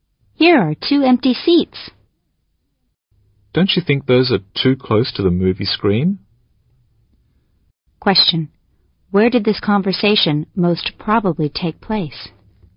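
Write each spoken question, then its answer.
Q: Where did this conversation most probably take place?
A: In a movie theater (cinema)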